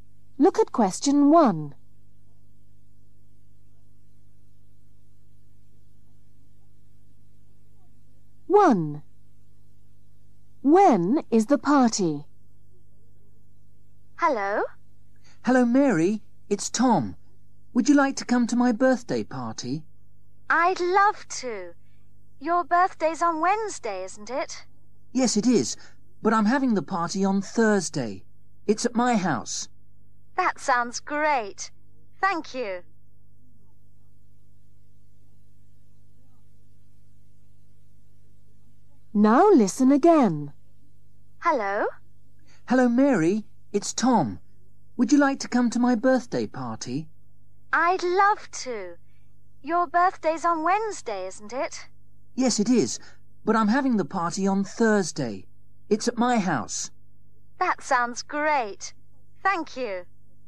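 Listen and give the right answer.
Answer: Thursday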